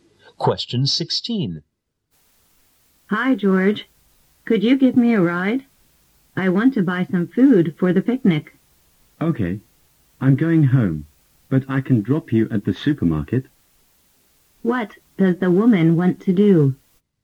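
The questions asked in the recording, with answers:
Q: What does the woman want to do?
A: Buy food for a picnic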